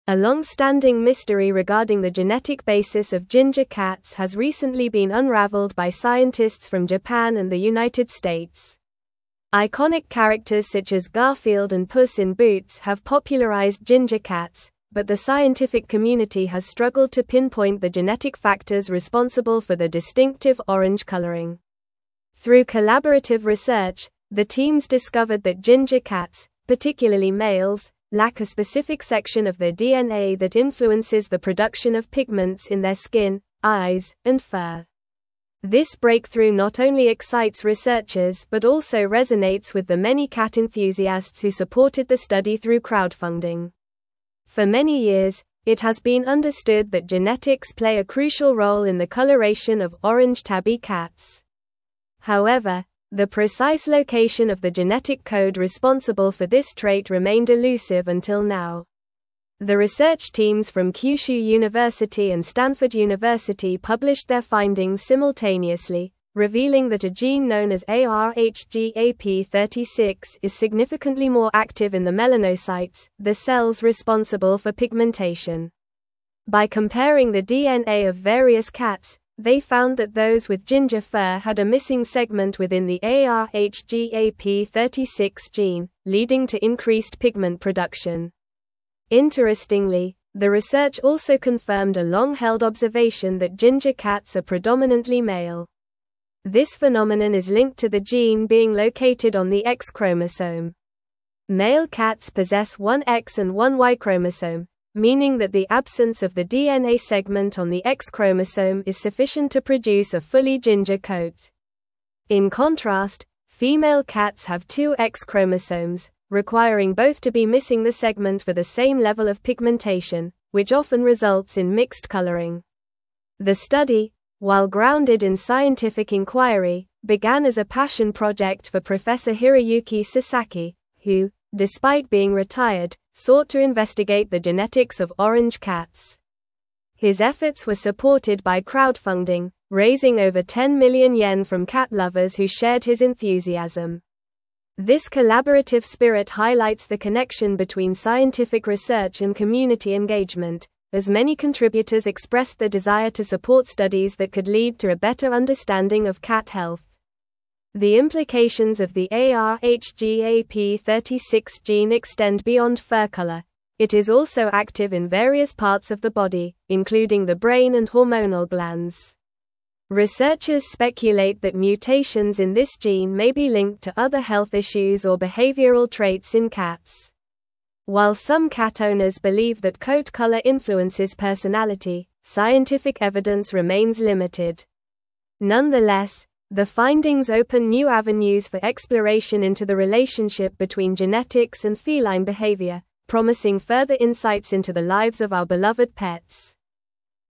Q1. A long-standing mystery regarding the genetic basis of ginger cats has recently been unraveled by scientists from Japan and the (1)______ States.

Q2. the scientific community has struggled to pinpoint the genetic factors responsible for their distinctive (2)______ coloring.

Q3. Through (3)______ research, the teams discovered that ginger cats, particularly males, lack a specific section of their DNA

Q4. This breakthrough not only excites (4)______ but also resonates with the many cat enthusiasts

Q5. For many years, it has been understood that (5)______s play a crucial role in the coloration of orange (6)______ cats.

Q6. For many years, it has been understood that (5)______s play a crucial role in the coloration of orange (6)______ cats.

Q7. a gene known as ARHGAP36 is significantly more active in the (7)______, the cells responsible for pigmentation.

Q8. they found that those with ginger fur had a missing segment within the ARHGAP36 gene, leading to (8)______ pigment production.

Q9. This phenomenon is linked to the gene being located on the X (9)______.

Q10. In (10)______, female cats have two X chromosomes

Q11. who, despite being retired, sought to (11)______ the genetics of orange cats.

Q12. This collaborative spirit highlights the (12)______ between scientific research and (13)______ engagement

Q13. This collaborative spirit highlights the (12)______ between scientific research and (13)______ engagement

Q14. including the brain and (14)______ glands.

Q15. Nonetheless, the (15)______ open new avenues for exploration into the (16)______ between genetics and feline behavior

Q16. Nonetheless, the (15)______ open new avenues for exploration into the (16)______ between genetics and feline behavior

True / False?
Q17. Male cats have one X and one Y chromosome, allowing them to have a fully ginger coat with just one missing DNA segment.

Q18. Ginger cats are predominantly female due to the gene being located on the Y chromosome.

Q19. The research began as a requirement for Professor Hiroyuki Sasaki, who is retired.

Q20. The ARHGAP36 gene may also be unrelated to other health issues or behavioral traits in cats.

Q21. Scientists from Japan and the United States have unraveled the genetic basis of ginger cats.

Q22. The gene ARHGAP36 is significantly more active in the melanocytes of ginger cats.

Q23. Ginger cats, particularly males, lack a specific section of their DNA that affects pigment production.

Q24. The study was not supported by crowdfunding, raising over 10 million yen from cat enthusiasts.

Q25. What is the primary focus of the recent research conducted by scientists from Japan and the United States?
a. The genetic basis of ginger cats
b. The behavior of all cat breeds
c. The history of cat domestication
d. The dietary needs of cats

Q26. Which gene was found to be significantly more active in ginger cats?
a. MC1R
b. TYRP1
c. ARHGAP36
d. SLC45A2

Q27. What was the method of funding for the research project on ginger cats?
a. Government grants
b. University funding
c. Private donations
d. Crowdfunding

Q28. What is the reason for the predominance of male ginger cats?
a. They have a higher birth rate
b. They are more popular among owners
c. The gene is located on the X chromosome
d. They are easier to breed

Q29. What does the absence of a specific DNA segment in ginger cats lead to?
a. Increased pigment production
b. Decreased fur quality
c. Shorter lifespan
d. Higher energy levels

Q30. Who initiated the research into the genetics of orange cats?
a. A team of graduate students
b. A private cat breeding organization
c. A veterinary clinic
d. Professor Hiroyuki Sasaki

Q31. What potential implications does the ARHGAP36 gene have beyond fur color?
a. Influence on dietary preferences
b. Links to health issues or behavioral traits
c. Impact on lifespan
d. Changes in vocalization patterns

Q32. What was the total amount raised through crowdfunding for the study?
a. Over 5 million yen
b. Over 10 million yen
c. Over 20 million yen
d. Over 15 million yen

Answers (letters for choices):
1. United
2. orange
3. collaborative
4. researchers
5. genetic
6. tabby
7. melanocytes
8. increased
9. chromosome
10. contrast
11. investigate
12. connection
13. community
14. hormonal
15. findings
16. relationship
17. True
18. False
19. False
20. False
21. True
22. True
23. True
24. False
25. a
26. c
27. d
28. c
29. a
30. d
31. b
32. b

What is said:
A long-standing mystery regarding the genetic basis of ginger cats has recently been unraveled by scientists from Japan and the United States. Iconic characters such as Garfield and Puss in Boots have popularized ginger cats, but the scientific community has struggled to pinpoint the genetic factors responsible for their distinctive orange coloring. Through collaborative research, the teams discovered that ginger cats, particularly males, lack a specific section of their DNA that influences the production of pigments in their skin, eyes, and fur. This breakthrough not only excites researchers but also resonates with the many cat enthusiasts who supported the study through crowdfunding.
For many years, it has been understood that genetics play a crucial role in the coloration of orange tabby cats. However, the precise location of the genetic code responsible for this trait remained elusive until now. The research teams from Kyushu University and Stanford University published their findings simultaneously, revealing that a gene known as ARHGAP36 is significantly more active in the melanocytes, the cells responsible for pigmentation. By comparing the DNA of various cats, they found that those with ginger fur had a missing segment within the ARHGAP36 gene, leading to increased pigment production.
Interestingly, the research also confirmed a long-held observation that ginger cats are predominantly male. This phenomenon is linked to the gene being located on the X chromosome. Male cats possess one X and one Y chromosome, meaning that the absence of the DNA segment on the X chromosome is sufficient to produce a fully ginger coat. In contrast, female cats have two X chromosomes, requiring both to be missing the segment for the same level of pigmentation, which often results in mixed coloring.
The study, while grounded in scientific inquiry, began as a passion project for Professor Hiroyuki Sasaki, who, despite being retired, sought to investigate the genetics of orange cats. His efforts were supported by crowdfunding, raising over 10 million yen from cat lovers who shared his enthusiasm. This collaborative spirit highlights the connection between scientific research and community engagement, as many contributors expressed their desire to support studies that could lead to a better understanding of cat health.
The implications of the ARHGAP36 gene extend beyond fur color; it is also active in various parts of the body, including the brain and hormonal glands. Researchers speculate that mutations in this gene may be linked to other health issues or behavioral traits in cats. While some cat owners believe that coat color influences personality, scientific evidence remains limited. Nonetheless, the findings open new avenues for exploration into the relationship between genetics and feline behavior, promising further insights into the lives of our beloved pets.

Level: Level 4